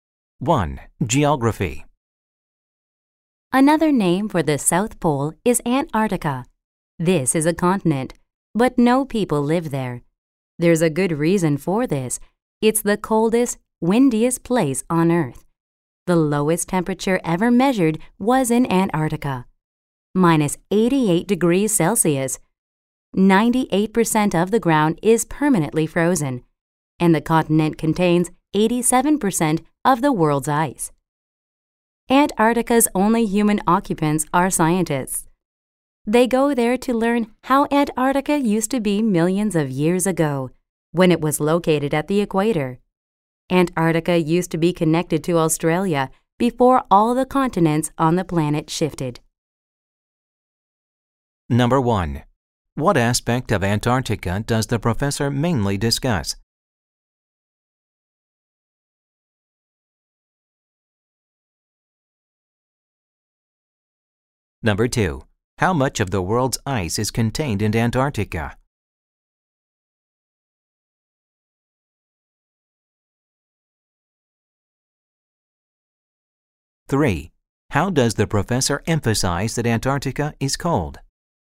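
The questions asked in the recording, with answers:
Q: How much of the world's ice is contained in Antarctica?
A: 87%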